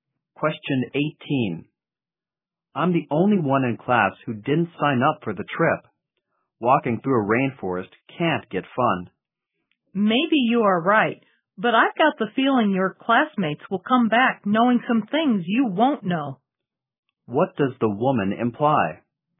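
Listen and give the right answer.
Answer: The man will miss learning things by not going on the trip.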